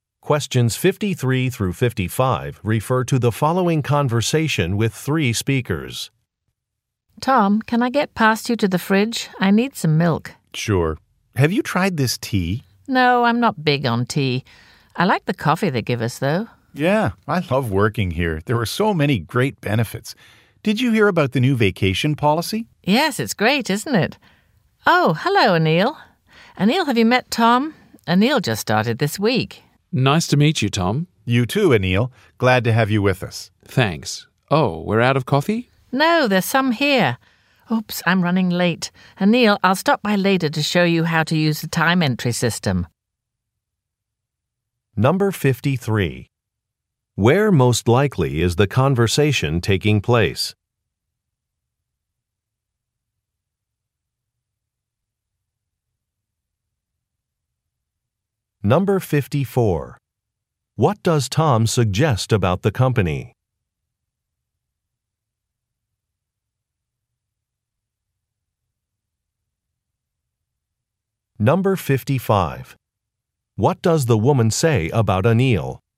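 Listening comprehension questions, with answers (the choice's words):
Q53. Where most likely is the conversation taking place?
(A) At a job fair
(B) At a meeting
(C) In an office kitchen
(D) In a coffee shop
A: In an office kitchen

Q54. What does Torn suggest about the company?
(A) It needs to hire more people.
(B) It treats its employees well.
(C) It will soon be renovated.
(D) It is buying some new equipment.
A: It treats its employees well.

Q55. What does the woman say about Anil?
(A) He has recently joined the company.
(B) He applied for her position.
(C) He will be reporting to Tom.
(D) He has just returned from vacation.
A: He has recently joined the company.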